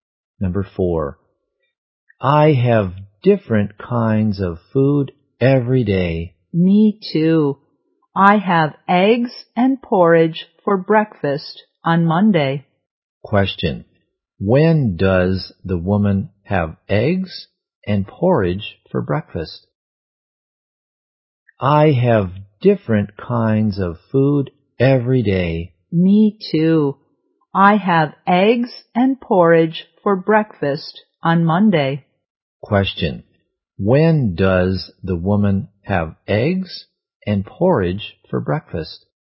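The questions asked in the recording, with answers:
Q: when does the woman have eggs and porridge for breakfast?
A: On Monday.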